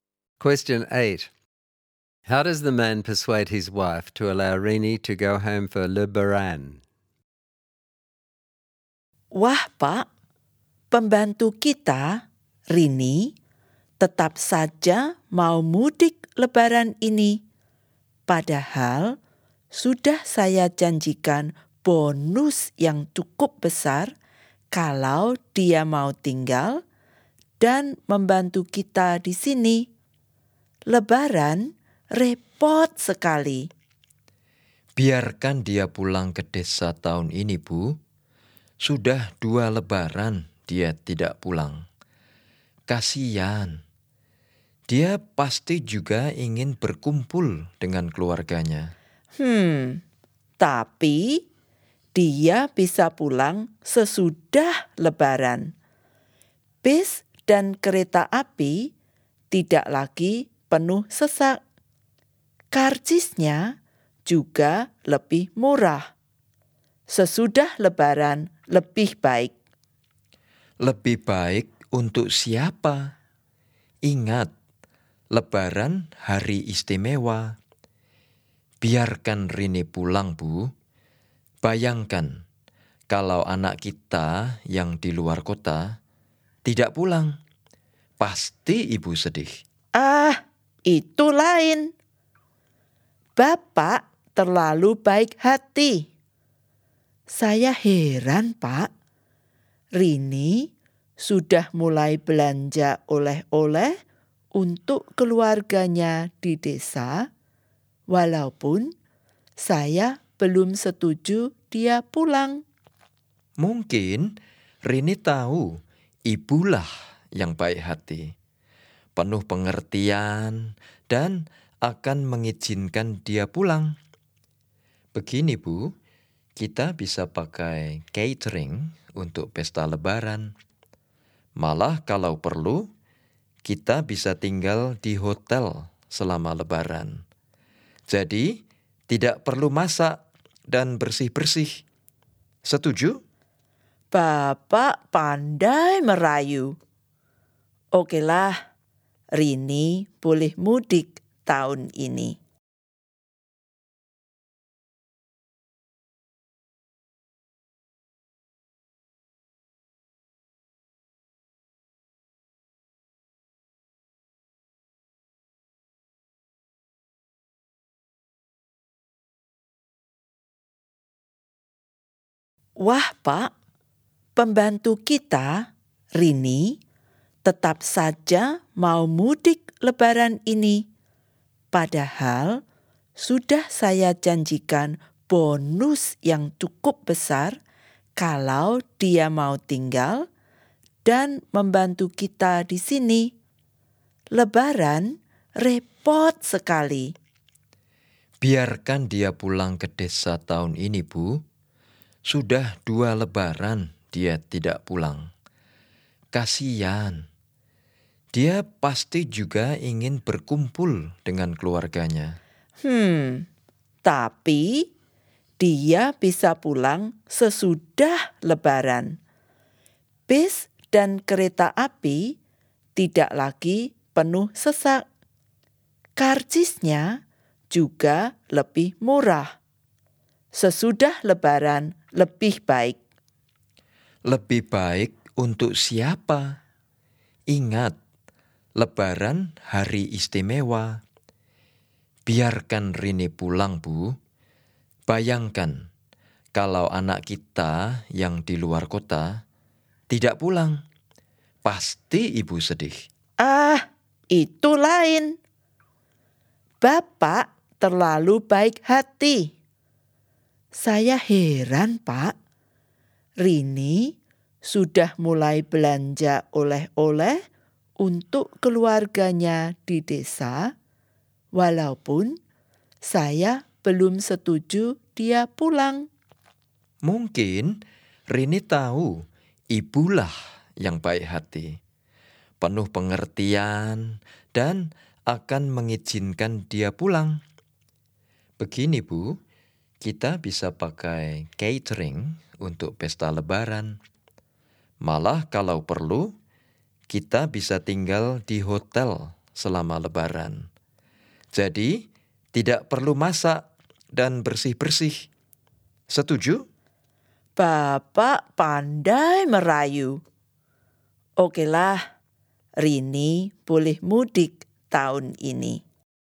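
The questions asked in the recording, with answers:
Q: How does the man persuade his wife to allow Rini to go home for Le Baran?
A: He appeals to her sympathy (Rini hasn't been home for two Lebarans; imagine if their own child didn't come home), flatters her as kind-hearted, and offers to use catering or stay in a hotel so there's no cooking or cleaning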